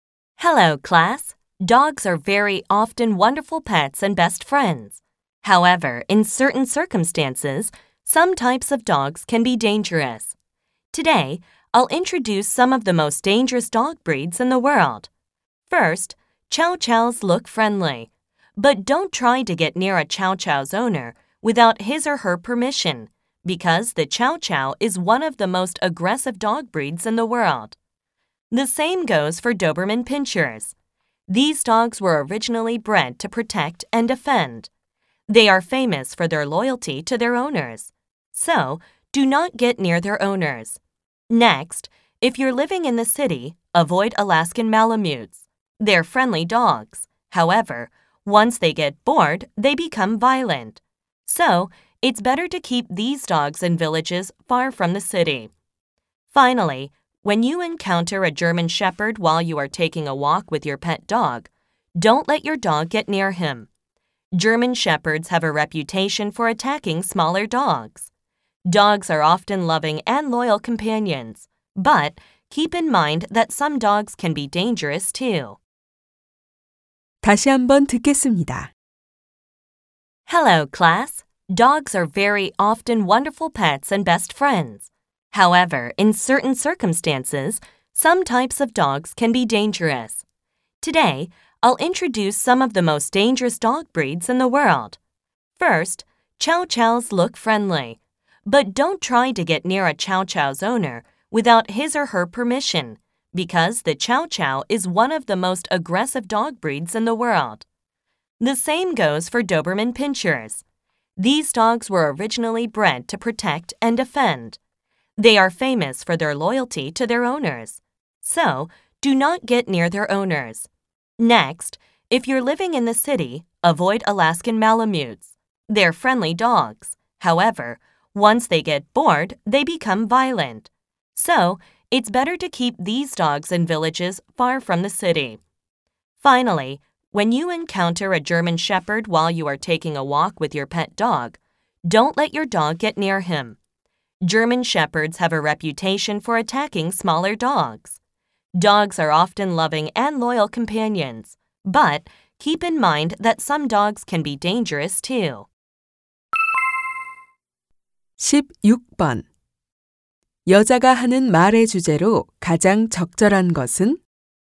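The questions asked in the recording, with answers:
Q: 여자가 하는 말의 주제로 가장 적절한 것은?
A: 세계에서 가장 위험한 개 품종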